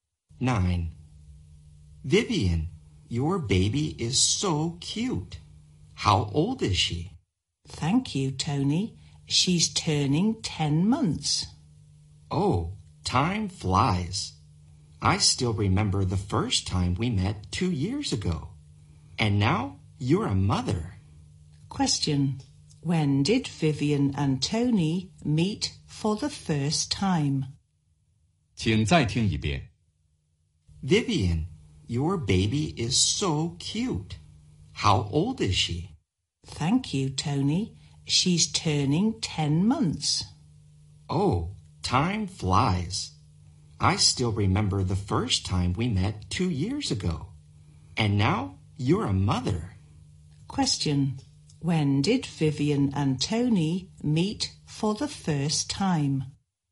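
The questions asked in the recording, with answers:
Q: When did Vivian and Tony meet for the first time?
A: Two years ago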